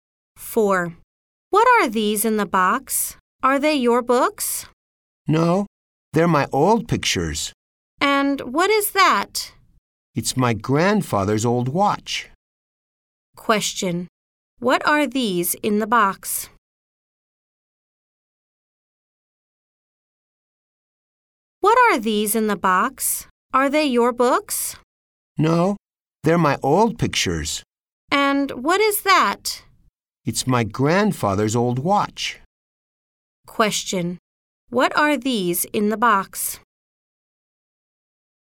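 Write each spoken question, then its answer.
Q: What are these in the box?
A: Old pictures.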